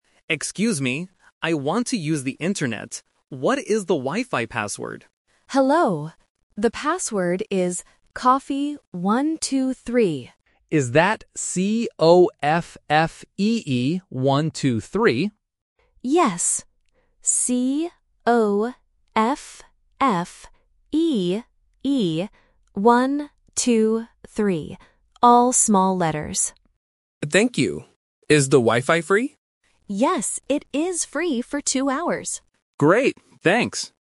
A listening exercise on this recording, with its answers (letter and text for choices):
Listen to the conversation and choose the correct answer (A, B, or C).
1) What does the customer want to use?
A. A computer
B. The Wifi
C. A phone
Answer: B. The Wifi

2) What is the Wifi password?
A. cafe123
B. coffee132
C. coffee123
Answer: C. coffee123

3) How long is the Wifi free?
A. One hour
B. Two hours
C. Three hours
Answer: B. Two hours

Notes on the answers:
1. The correct answer is B. The customer explicitly asks, "What is the Wifi password?". Options A and C are devices used to access the internet, but they are not mentioned in the dialogue.
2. The correct answer is C. The staff says the password is "coffee123", and the customer spells it out: "C-O-F-F-E-E, one, two, three". Option A (cafe123) is a trap because "cafe" and "coffee" are related words. Option B (coffee132) is a trap because the numbers "123" and "132" can be confusing if the listener is not paying attention.
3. The correct answer is B. The staff says, "it is free for two hours". Options A and C are plausible time limits for free Wifi, but they are not mentioned in the audio.